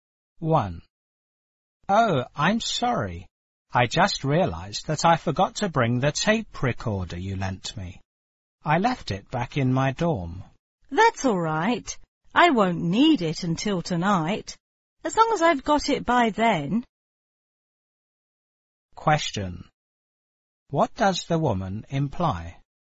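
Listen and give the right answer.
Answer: The man can return the tape recorder later, as long as she has it by tonight.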